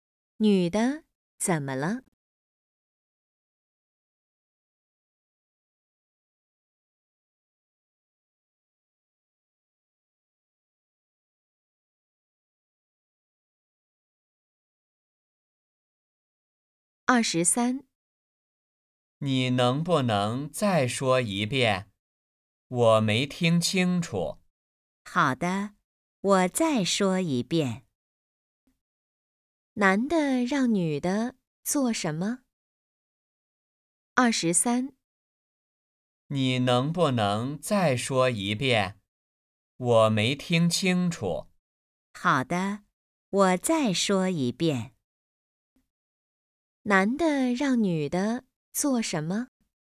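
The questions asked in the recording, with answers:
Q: 男的让女的做什么?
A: 再说一遍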